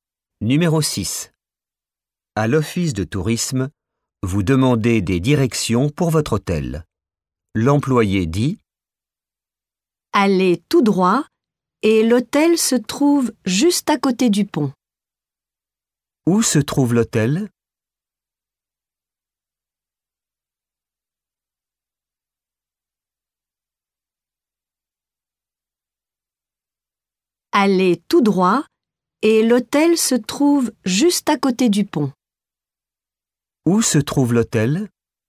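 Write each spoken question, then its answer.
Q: Où se trouve l'hôtel?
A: Juste à côté du pont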